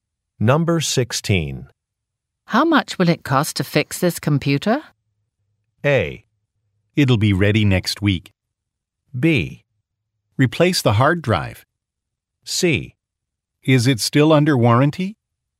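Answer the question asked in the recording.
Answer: C: Is it still under warranty?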